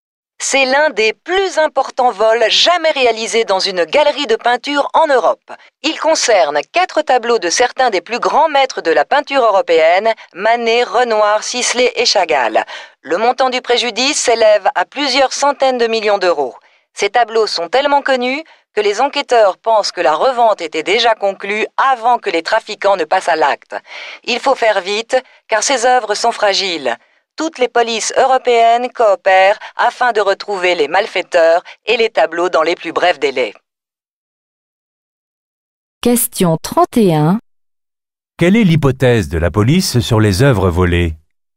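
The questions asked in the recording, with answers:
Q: Quelle est l'hypothèse de la police sur les œuvres volées ?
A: Leur revente était déjà conclue avant le vol.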